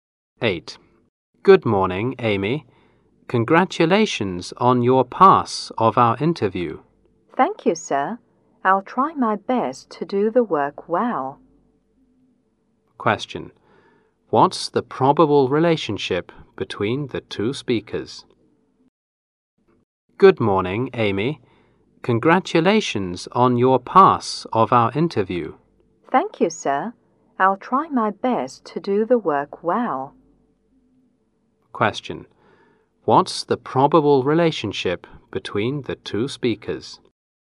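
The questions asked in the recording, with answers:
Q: What's the probable relationship between the two speakers?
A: Employer and new employee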